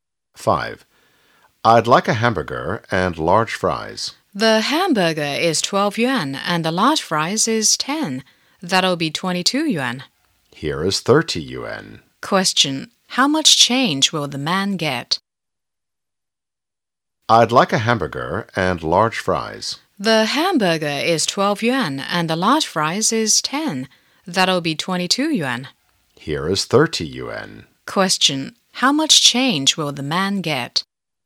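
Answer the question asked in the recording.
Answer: 8 yuan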